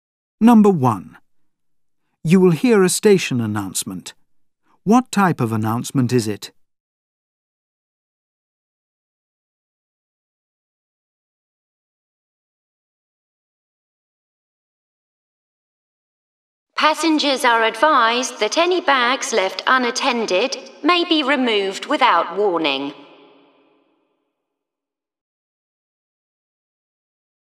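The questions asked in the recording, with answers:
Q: What type of announcement is it?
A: A security warning about unattended bags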